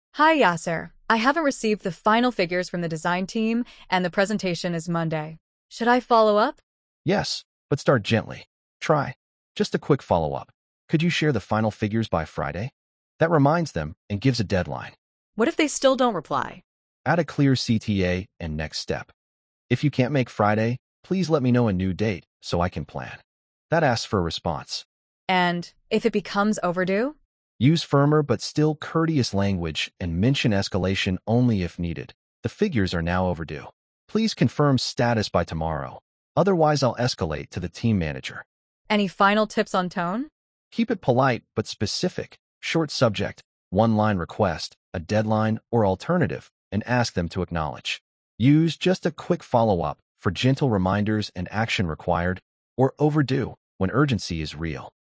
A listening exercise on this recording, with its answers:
Complete the phrases as you listen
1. That reminds them and gives a ______.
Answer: deadline

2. Add a clear ______ and next step.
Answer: CTA

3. If you can't make Friday, please let me know a new ______ so I can plan.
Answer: date

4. Use firmer but still ______ language and mention escalation only if needed.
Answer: courteous

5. "The figures are now ______"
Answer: overdue

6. Keep it polite but specific, short subject, one line request, a deadline or ______, and ask them to acknowledge.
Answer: alternative

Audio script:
Sara: Hi Yasir, I haven't received the final figures from the design team and the presentation is Monday. Should I follow up?
Yasir: Yes but start gently. Try: "Just a quick follow-up could you share the final figures by Friday?" That reminds them and gives a deadline.
Sara: What if they still don't reply?
Yasir: Add a clear CTA and next step: "If you can't make Friday, please let me know a new date so I can plan." That asks for a response.
Sara: And if it becomes overdue?
Yasir: Use firmer but still courteous language and mention escalation only if needed: "The figures are now overdue. Please confirm status by tomorrow; otherwise I'll escalate to the team manager."
Sara: Any final tips on tone?
Yasir: Keep it polite but specific, short subject, one line request, a deadline or alternative, and ask them to acknowledge. Use "just a quick follow-up" for gentle reminders and "action required" or "overdue" when urgency is real.